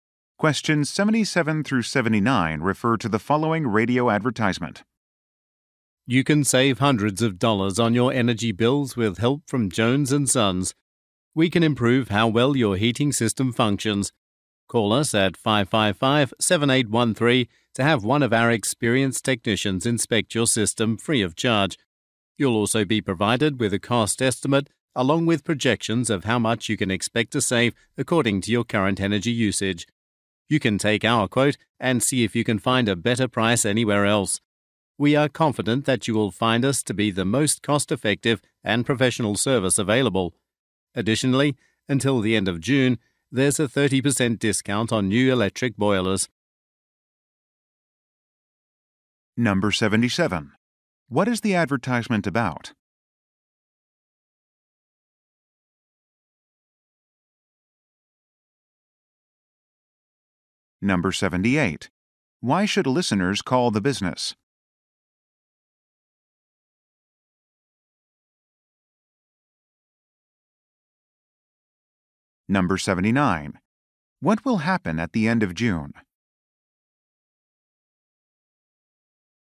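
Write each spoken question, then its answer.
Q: What is the advertisement about?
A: Heating system services

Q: Why should listeners call the business?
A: To get a free inspection of their system

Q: What will happen at the end of June?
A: A 30% discount on new electric boilers will end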